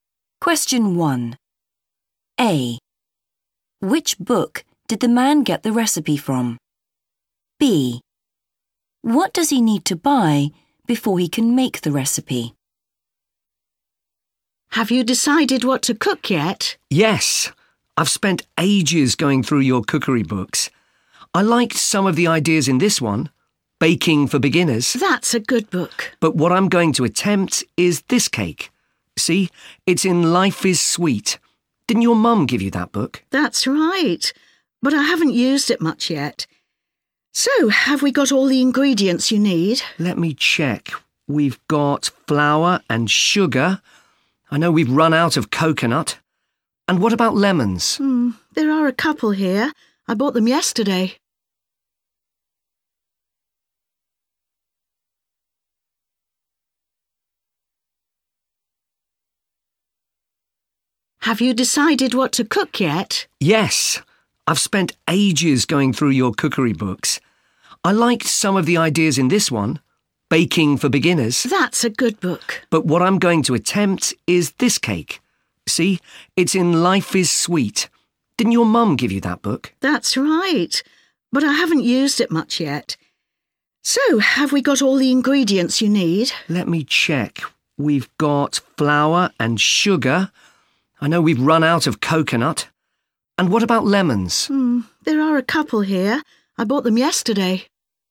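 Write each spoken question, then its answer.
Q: Which book did the man get the recipe from?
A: Life is Sweet

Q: What does he need to buy before he can make the recipe?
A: coconut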